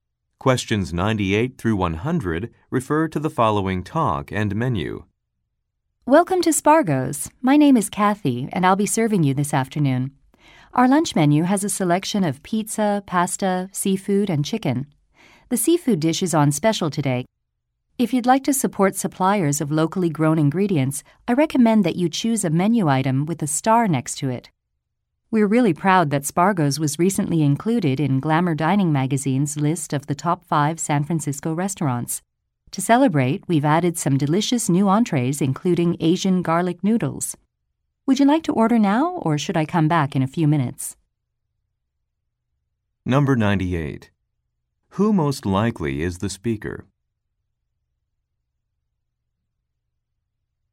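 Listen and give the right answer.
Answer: A server at a restaurant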